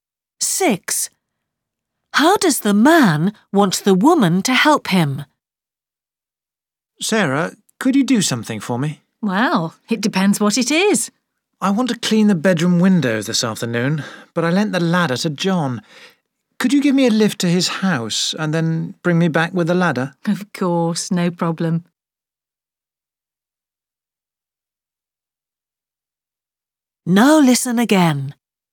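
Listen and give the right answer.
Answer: Give him a lift to John's house and bring him back with the ladder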